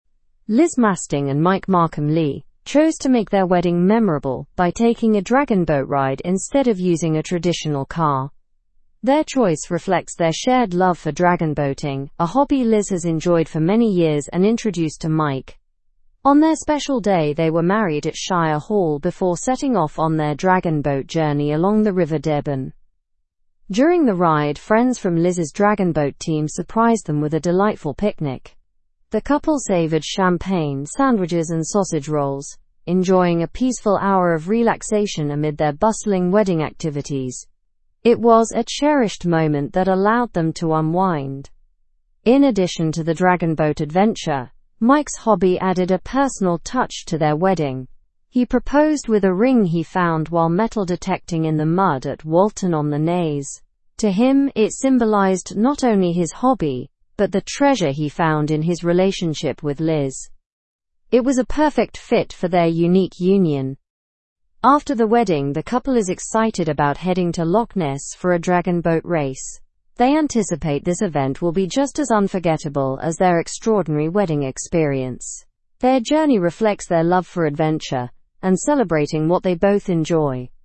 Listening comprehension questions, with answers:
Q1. Why did Liz and Mike choose a dragon boat for their wedding?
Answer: They both love dragon boating.

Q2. What did friends from Liz's crew provide during the journey?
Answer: They provided a picnic with champagne, sandwiches, and sausage rolls.

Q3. Where was the couple married?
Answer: At Shire Hall.

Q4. What symbolized Mike's proposal to Liz?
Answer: A ring he found while metal detecting.

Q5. What future event are Liz and Mike looking forward to?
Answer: A dragon boat race at Loch Ness.

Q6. Where did Mike find the engagement ring?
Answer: In the mud at Walton-on-the-Naze.

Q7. How did the couple relax during their wedding day?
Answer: They relaxed during the dragon boat ride with a peaceful picnic.

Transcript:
Liz Masding and Mike Markham-Lee chose to make their wedding memorable by taking a dragon boat ride instead of using a traditional car. Their choice reflects their shared love for dragon boating, a hobby Liz has enjoyed for many years and introduced to Mike. On their special day, they were married at Shire Hall before setting off on their dragon boat journey along the River Deben.
During the ride, friends from Liz's dragon boat team surprised them with a delightful picnic. The couple savored champagne, sandwiches, and sausage rolls, enjoying a peaceful hour of relaxation amid their bustling wedding activities. It was a cherished moment that allowed them to unwind.
In addition to the dragon boat adventure, Mike's hobby added a personal touch to their wedding. He proposed with a ring he found while metal detecting in the mud at Walton-on-the-Naze. To him, it symbolized not only his hobby but the treasure he found in his relationship with Liz. It was a perfect fit for their unique union.
After the wedding, the couple is excited about heading to Loch Ness for a dragon boat race. They anticipate this event will be just as unforgettable as their extraordinary wedding experience.

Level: Level 3